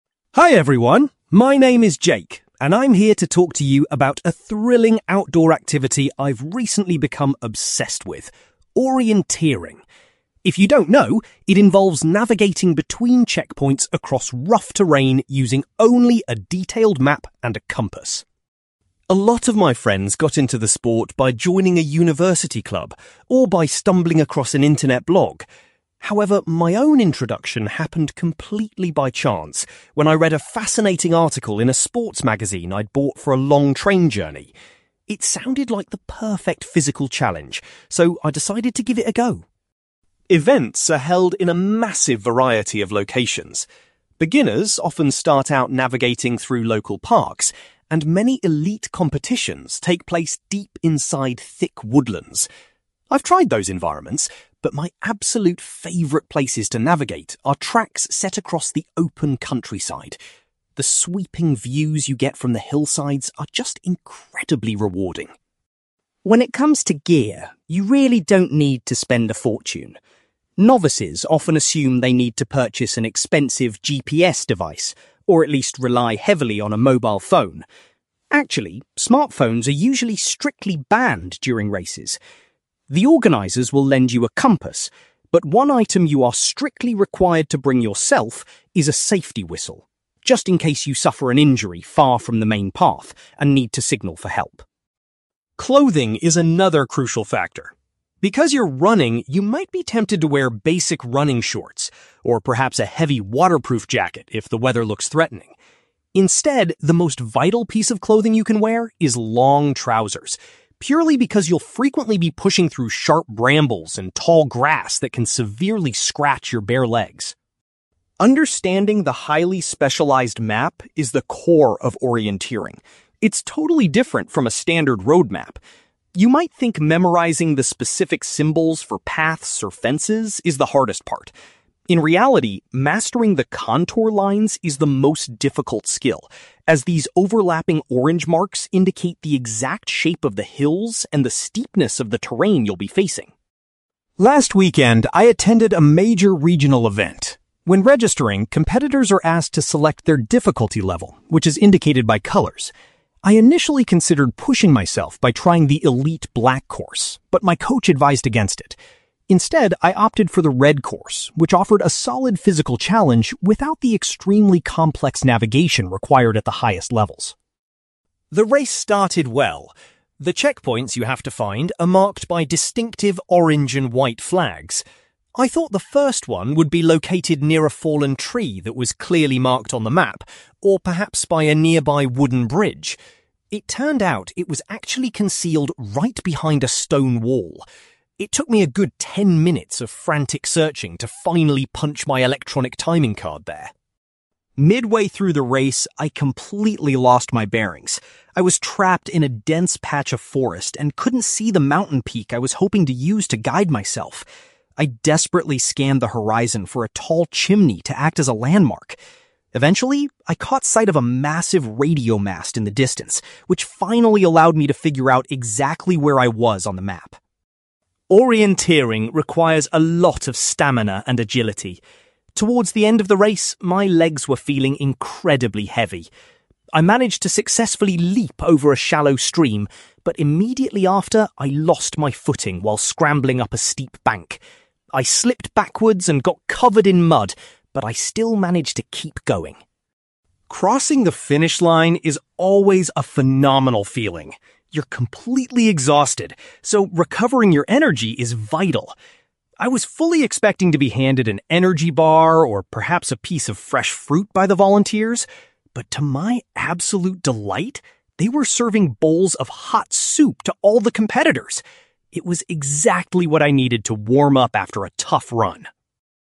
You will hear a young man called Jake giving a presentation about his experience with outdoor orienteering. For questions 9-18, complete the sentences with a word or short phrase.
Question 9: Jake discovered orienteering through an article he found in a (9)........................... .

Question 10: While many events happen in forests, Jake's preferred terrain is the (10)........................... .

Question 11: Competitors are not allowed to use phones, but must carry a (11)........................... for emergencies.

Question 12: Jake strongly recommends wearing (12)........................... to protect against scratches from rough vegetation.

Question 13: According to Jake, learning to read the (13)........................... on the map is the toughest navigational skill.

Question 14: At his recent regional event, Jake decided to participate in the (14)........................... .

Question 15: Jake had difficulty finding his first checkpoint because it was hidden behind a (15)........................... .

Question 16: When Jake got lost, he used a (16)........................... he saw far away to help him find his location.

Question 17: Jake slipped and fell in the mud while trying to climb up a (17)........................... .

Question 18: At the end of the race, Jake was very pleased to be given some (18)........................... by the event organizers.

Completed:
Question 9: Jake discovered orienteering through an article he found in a sports magazine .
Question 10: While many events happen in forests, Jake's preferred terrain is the open countryside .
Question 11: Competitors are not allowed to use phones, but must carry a safety whistle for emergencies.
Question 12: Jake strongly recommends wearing long trousers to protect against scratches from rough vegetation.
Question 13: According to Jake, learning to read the contour lines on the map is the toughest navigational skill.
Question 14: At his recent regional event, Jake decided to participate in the red course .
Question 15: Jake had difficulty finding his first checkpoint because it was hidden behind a stone wall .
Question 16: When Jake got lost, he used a radio mast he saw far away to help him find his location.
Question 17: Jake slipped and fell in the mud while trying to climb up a steep bank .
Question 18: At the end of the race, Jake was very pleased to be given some hot soup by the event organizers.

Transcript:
Jake: Hi everyone! My name is Jake, and I'm here to talk to you about a thrilling outdoor activity I've recently become obsessed with: orienteering. If you don't know, it involves navigating between checkpoints across rough terrain using only a detailed map and a compass.
A lot of my friends got into the sport by joining a university club or by stumbling across an internet blog. However, my own introduction happened completely by chance when I read a fascinating article in a sports magazine I'd bought for a long train journey. It sounded like the perfect physical challenge, so I decided to give it a go.
Events are held in a massive variety of locations. Beginners often start out navigating through local parks, and many elite competitions take place deep inside thick woodlands. I've tried those environments, but my absolute favourite places to navigate are tracks set across the open countryside. The sweeping views you get from the hillsides are just incredibly rewarding.
When it comes to gear, you really don't need to spend a fortune. Novices often assume they need to purchase an expensive GPS device, or at least rely heavily on a mobile phone. Actually, smartphones are usually strictly banned during races! The organizers will lend you a compass, but one item you are strictly required to bring yourself is a safety whistle, just in case you suffer an injury far from the main path and need to signal for help.
Clothing is another crucial factor. Because you're running, you might be tempted to wear basic running shorts, or perhaps a heavy waterproof jacket if the weather looks threatening. Instead, the most vital piece of clothing you can wear is long trousers, purely because you'll frequently be pushing through sharp brambles and tall grass that can severely scratch your bare legs.
Understanding the highly specialized map is the core of orienteering. It's totally different from a standard road map. You might think memorizing the specific symbols for paths or fences is the hardest part. In reality, mastering the contour lines is the most difficult skill, as these overlapping orange marks indicate the exact shape of the hills and the steepness of the terrain you'll be facing.
Last weekend, I attended a major regional event. When registering, competitors are asked to select their difficulty level, which is indicated by colors. I initially considered pushing myself by trying the elite black course, but my coach advised against it. Instead, I opted for the red course, which offered a solid physical challenge without the extremely complex navigation required at the highest levels.
The race started well. The checkpoints you have to find are marked by distinctive orange and white flags. I thought the first one would be located near a fallen tree that was clearly marked on the map, or perhaps by a nearby wooden bridge. It turned out it was actually concealed right behind a stone wall. It took me a good ten minutes of frantic searching to finally punch my electronic timing card there!
Midway through the race, I completely lost my bearings. I was trapped in a dense patch of forest and couldn't see the mountain peak I was hoping to use to guide myself. I desperately scanned the horizon for a tall chimney to act as a landmark. Eventually, I caught sight of a massive radio mast in the distance, which finally allowed me to figure out exactly where I was on the map.
Orienteering requires a lot of stamina and agility. Towards the end of the race, my legs were feeling incredibly heavy. I managed to successfully leap over a shallow stream, but immediately after, I lost my footing while scrambling up a steep bank. I slipped backwards and got covered in mud, but I still managed to keep going!
Crossing the finish line is always a phenomenal feeling. You're completely exhausted, so recovering your energy is vital. I was fully expecting to be handed an energy bar or perhaps a piece of fresh fruit by the volunteers. But to my absolute delight, they were serving bowls of hot soup to all the competitors. It was exactly what I needed to warm up after a tough run.

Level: B2